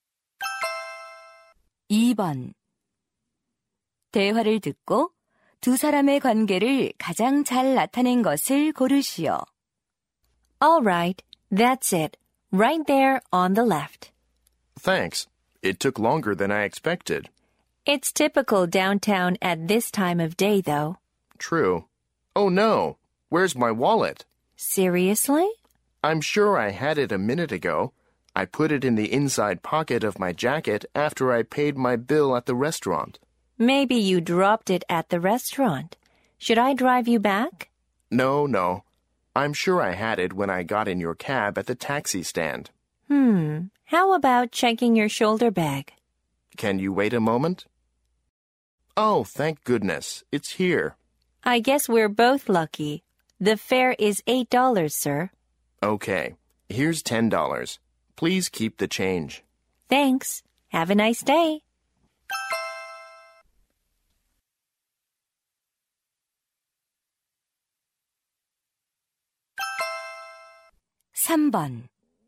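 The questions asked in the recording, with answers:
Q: 대화를 듣고 두 사람의 관계를 가장 잘 나타낸 것을 고르시오.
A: 승객 - 택시 기사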